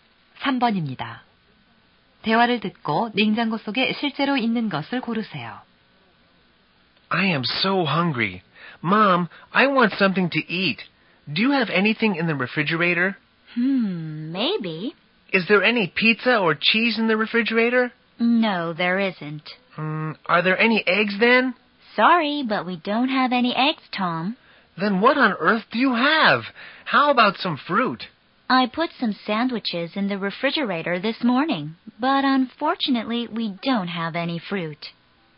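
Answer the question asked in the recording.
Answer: 샌드위치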